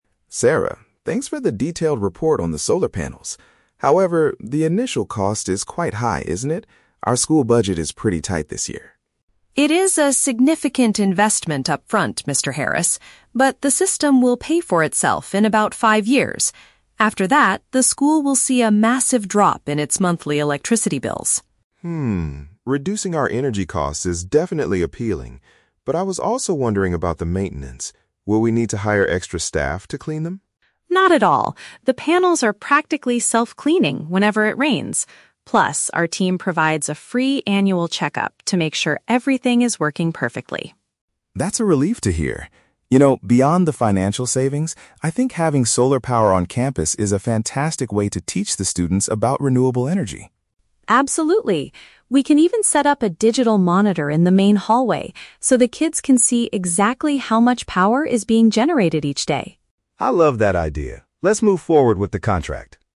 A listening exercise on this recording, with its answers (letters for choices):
Listen to a conversation between a school principal and a technician. Choose the correct answer (A, B, or C) for each question.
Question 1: What is Mr. Harris's primary concern at the beginning of the meeting?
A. The expensive price to set up the system.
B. The lack of space on the school's roof.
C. The monthly electricity bills increasing.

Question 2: How will the solar panels be kept clean?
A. The school will hire a new maintenance worker.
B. Rainwater will naturally wash the dirt away.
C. The technical team will visit every month to wash them.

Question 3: Besides saving money, what other advantage does Mr. Harris see in the solar panels?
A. They will provide a backup power source during bad weather.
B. They will pay for themselves in just five years.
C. They can serve as a practical learning tool for the children.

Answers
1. A
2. B
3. C

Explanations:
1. Mr. Harris starts by saying the "initial cost is quite high" and mentions the school's "tight budget." (Paraphrasing: expensive price = high initial cost / significant investment upfront). Why the trap is wrong: Option (C) is a trap. Electricity bills are mentioned, but Sarah says they will see a "massive drop" (decrease), not an increase. Option (B) is plausible but never mentioned.
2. Sarah explains that the panels are "self-cleaning whenever it rains." (Paraphrasing: rainwater will naturally wash = self-cleaning whenever it rains). Why the trap is wrong: Option (A) is the trap. Mr. Harris asks if they need to "hire extra staff to clean them," but Sarah says "Not at all" (rejecting the idea). Option (C) is also a trap; the team does a "free annual check-up" (once a year), not monthly cleaning visits.
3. Mr. Harris says it is a "fantastic way to teach the students about renewable energy." (Paraphrasing: learning tool for the children = teach the students). Why the trap is wrong: Option (B) is a trap. Paying for themselves in five years is mentioned in the audio, but this is a financial benefit, and the question specifically asks for an advantage besides saving money. Option (A) is an unmentioned plausible fact.

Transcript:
Mr. Harris: Sarah, thanks for the detailed report on the solar panels. However, the initial cost is quite high, isn't it? Our school budget is pretty tight this year.
Sarah: It is a significant investment upfront, Mr. Harris. But, the system will pay for itself in about five years. After that, the school will see a massive drop in its monthly electricity bills.
Mr. Harris: Hmm, reducing our energy costs is definitely appealing. But I was also wondering about the maintenance. Will we need to hire extra staff to clean them?
Sarah: Not at all. The panels are practically self-cleaning whenever it rains. Plus, our team provides a free annual check-up to make sure everything is working perfectly.
Mr. Harris: That's a relief to hear. You know, beyond the financial savings, I think having solar power on campus is a fantastic way to teach the students about renewable energy.
Sarah: Absolutely. We can even set up a digital monitor in the main hallway so the kids can see exactly how much power is being generated each day.